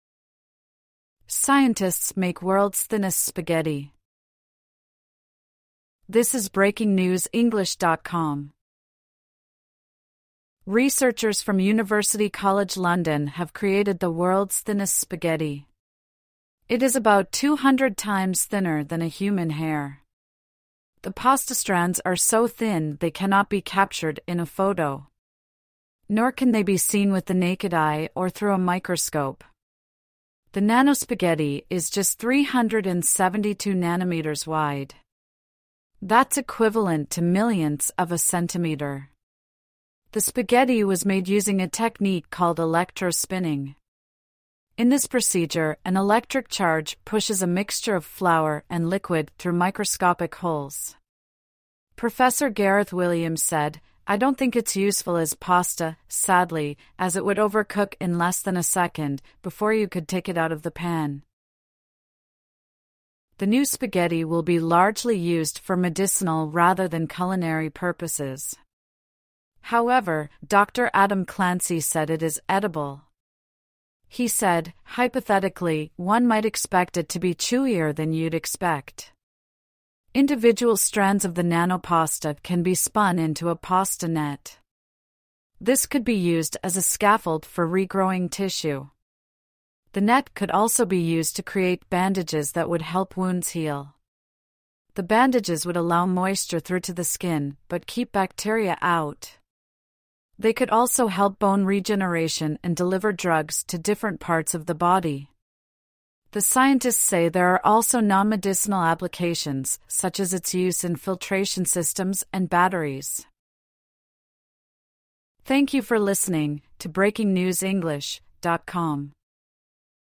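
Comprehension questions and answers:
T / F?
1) The new spaghetti is the width of 200 human hairs.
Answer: F

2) The new spaghetti can only be seen through a microscope.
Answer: F

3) Electricity pushes liquid flour through tiny holes to make the spaghetti.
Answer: T

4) It takes a long time to boil the nanospaghetti.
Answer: F

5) The thin spaghetti is inedible.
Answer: F

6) The spaghetti can be made into a web to help regrow tissue.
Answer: T

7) The spaghetti can be used to make bacteriaresistant bandages.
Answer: T

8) The spaghetti can only be used for medicinal purposes.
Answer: F

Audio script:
Scientists make world's thinnest spaghetti
Researchers from University College London have created the world's thinnest spaghetti. It is about 200 times thinner than a human hair. The pasta strands are so thin they cannot be captured in a photo. Nor can they be seen with the naked eye or through a microscope. 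The nano-spaghetti is just 372 nanometres wide. That's equivalent to millionths of a centimetre. The spaghetti was made using a technique called electro-spinning. In this procedure, an electric charge pushes a mixture of flour and liquid through microscopic holes. Professor Gareth Williams said: "I don't think it's useful as pasta, sadly, as it would overcook in less than a second, before you could take it out of the pan."
The new spaghetti will be largely used for medicinal rather than culinary purposes. However, Dr Adam Clancy said it is edible. He said: "Hypothetically, one might expect it to be chewier than you'd expect". Individual strands of the nanopasta can be spun into a pasta net. This could be used as a scaffold for regrowing tissue. The net could also be used to create bandages that would help wounds heal. The bandages would allow moisture through to the skin, but keep bacteria out. 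They could also help bone regeneration and deliver drugs to different parts of the body. The scientists say there are also non-medicinal applications, such as its use in filtration systems and batteries.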